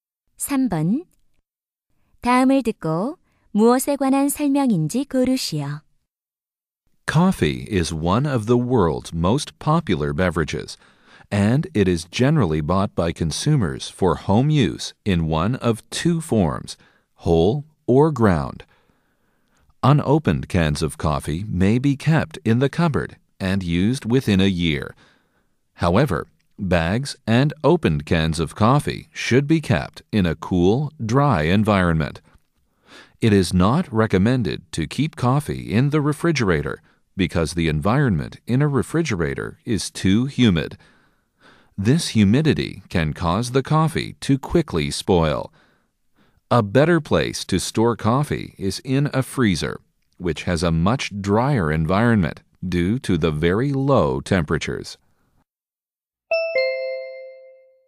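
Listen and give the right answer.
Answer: 커피 보관 방법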